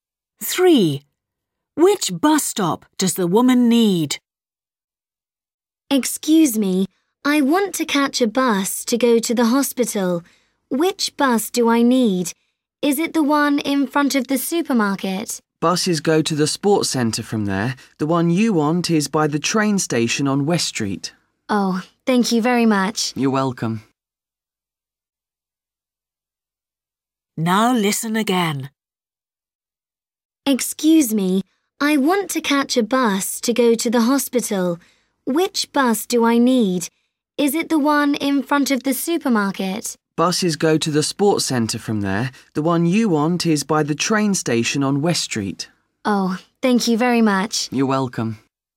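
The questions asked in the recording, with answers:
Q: Which bus stop does the woman need?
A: The one by the train station on West Street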